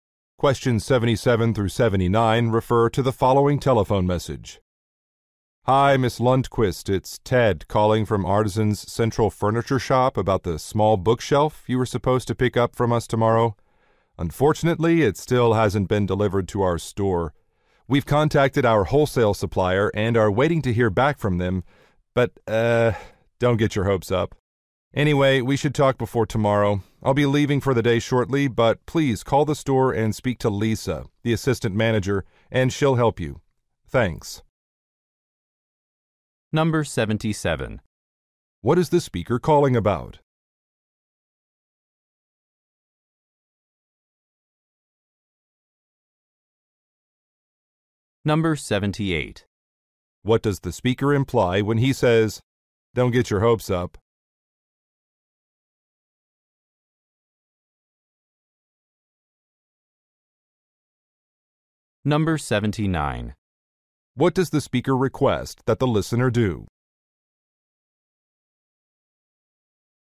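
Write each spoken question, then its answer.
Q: What is the speaker calling about?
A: A bookshelf order that has not been delivered to the store

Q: What does the speaker imply when he says, "Don't get your hopes up"?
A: The bookshelf probably won't arrive by tomorrow

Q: What does the speaker request that the listener do?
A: Call the store and speak to Lisa, the assistant manager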